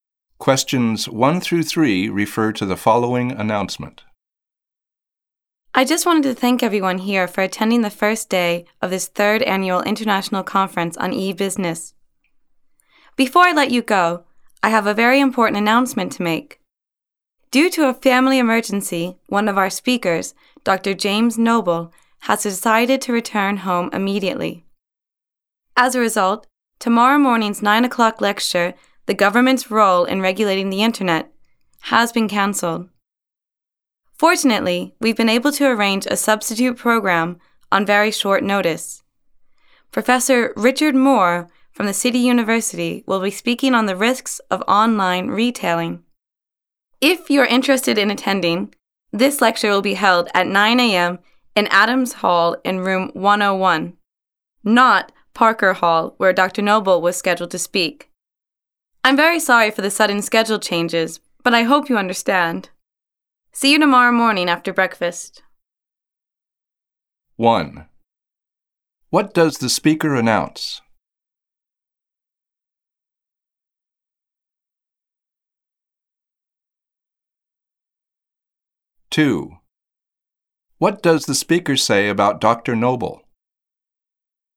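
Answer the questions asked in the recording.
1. A lecture has been cancelled and replaced
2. He returned home due to a family emergency
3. A lecture on the risks of online retailing by Professor Richard Moore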